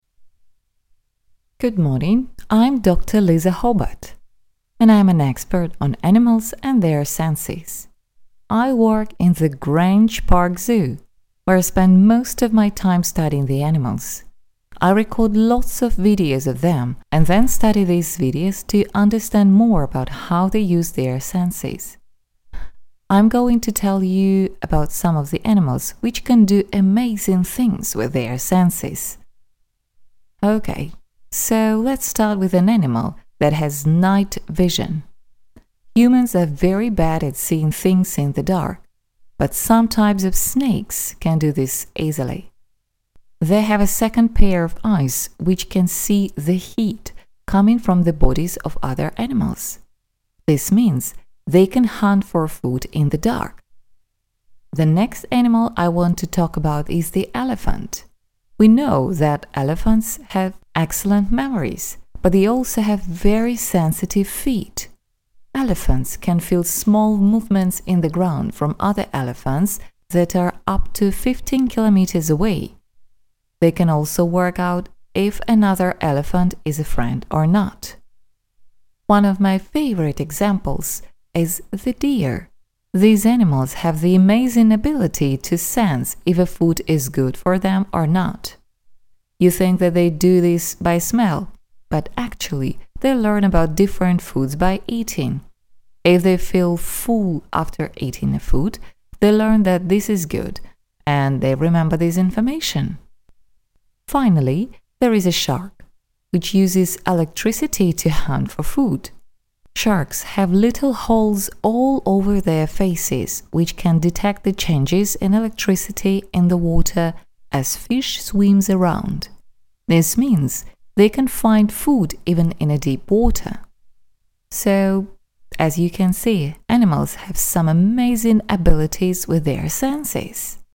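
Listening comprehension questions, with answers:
You will hear a talk about amazing animal senses. For questions 1-5, write the correct answer in the gaps. В ответе укажи только слово без пробелов, без кавычек и каких-либо знаков препинания. Например, trouble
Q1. Dr Hobart watches (1) __________ to learn more about animals' senses.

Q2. Some snakes can find food at night by sensing the (2) __________ of other animals.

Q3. Elephants can sense the movements of other elephants through the (3) __________.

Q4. Deer can learn and (4) __________ what foods are good and bad for them to eat.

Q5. Sharks notice differences in (5) __________ to help them find food.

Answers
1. videos
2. heat
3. feet
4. remember
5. electricity

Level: 11 класс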